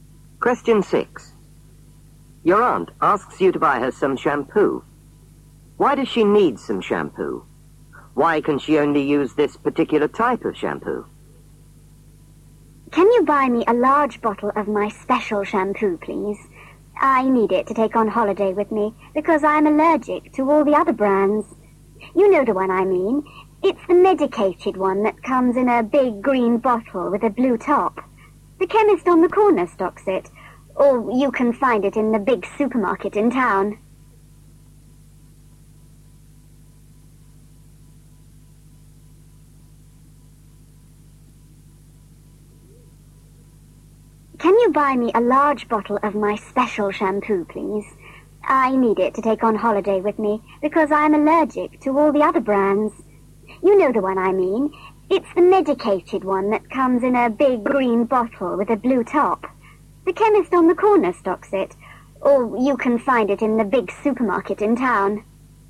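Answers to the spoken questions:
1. To take on holiday
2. She's allergic to all the other brands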